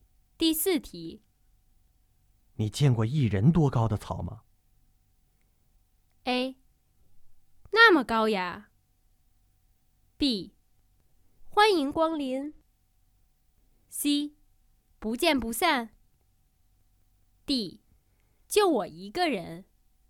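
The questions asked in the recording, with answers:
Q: 你见过一人多高的草吗?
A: A: 那么高呀。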